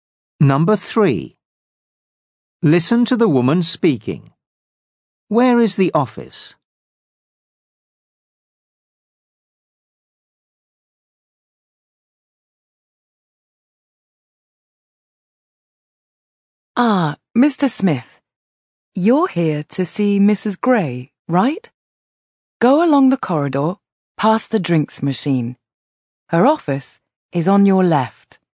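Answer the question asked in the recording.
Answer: along the corridor, past the drinks machine, on the left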